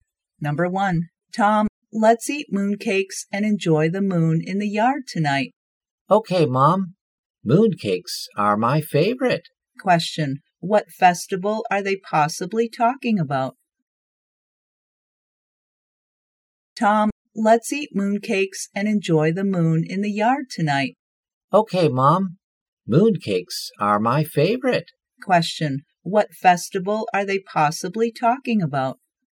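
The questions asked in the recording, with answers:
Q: what festival are they possibly talking about?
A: The Mid-Autumn Festival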